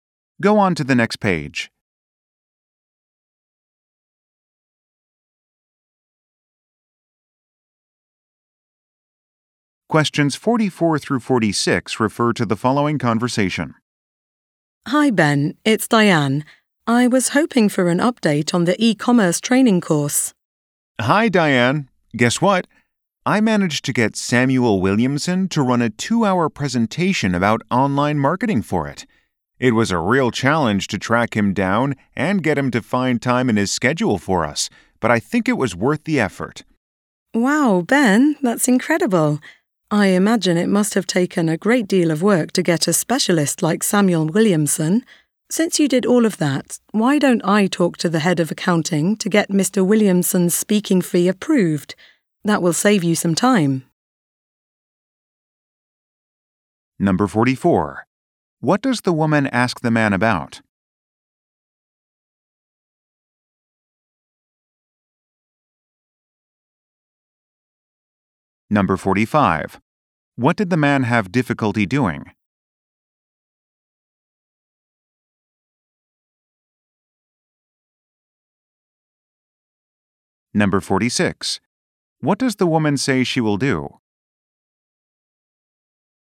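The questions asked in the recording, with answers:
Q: What does the woman ask the man about?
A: An update on the e-commerce training course

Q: What did the man have difficulty doing?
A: Tracking down Samuel Williamson and getting him to find time

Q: What does the woman say she will do?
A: Talk to the head of accounting to get the speaking fee approved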